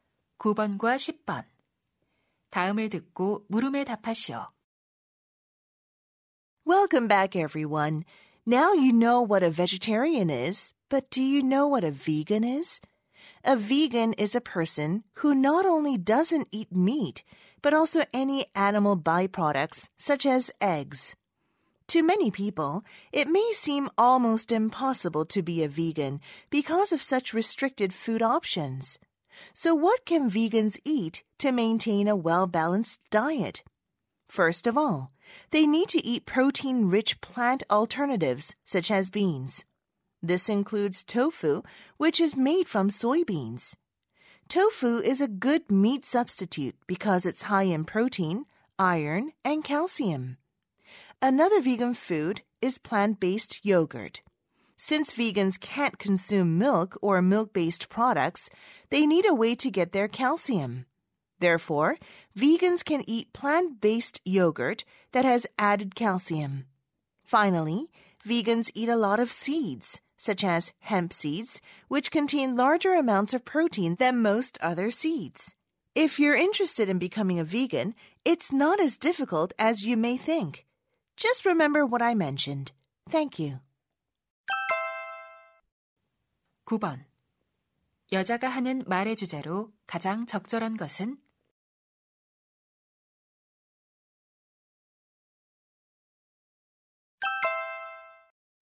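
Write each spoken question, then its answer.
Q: 여자가 하는 말의 주제로 가장 적절한 것은?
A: 균형 잡힌 식단을 위해 비건이 먹을 수 있는 음식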